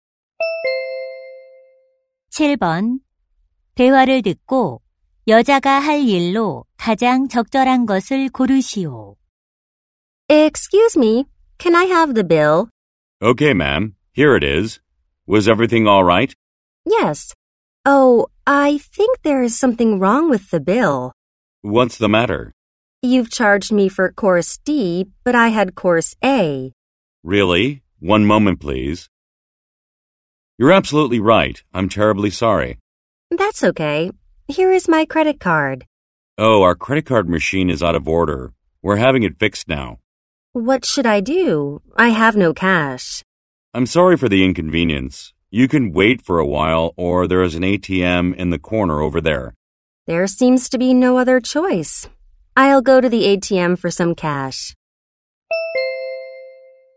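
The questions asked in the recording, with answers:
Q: 대화를 듣고 여자가 할 일로 가장 적절한 것을 고르시오.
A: ATM에서 현금 인출하기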